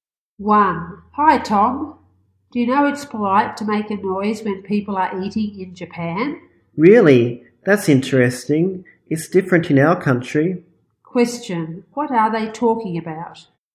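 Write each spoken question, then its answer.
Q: What are they talking about?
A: Table manners in Japan (making noise while eating is polite)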